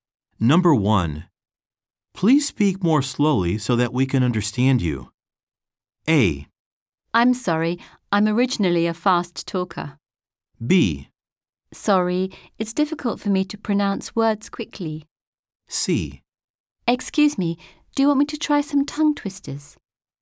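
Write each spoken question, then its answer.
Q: Please speak more slowly so that we can understand you.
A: A: I'm sorry, I'm originally a fast talker.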